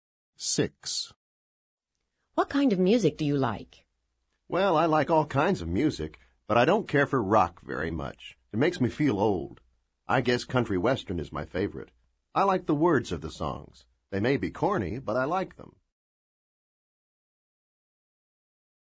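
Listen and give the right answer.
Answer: Country western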